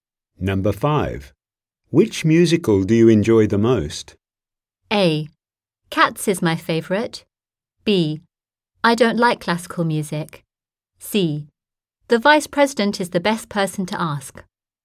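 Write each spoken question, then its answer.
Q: Which musical do you enjoy the most?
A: A: Cats is my favorite.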